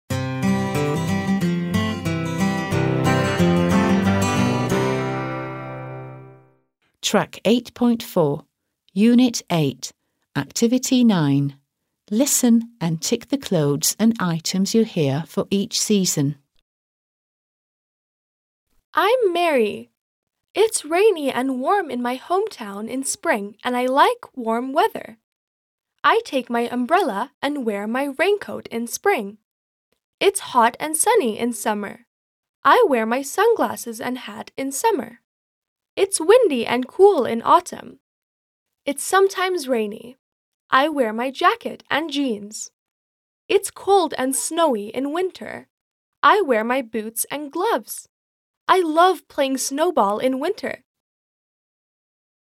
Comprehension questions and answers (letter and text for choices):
9. Listen and tick (√) the clothes and items you hear for each season.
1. Spring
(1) Shoes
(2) An umbrella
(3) A raincoat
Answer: (2) An umbrella

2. Summer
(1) Sunglasses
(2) Socks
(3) A hat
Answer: (1) Sunglasses

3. Autumn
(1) A T-shirt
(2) A jacket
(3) Jeans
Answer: (2) A jacket

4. Winter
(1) Boots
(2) A shirt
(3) Gloves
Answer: (1) Boots

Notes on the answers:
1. I take my umbrella and wear my raincoat in spring.
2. I wear my sunglasses and hat in summer.

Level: 4. Sınıf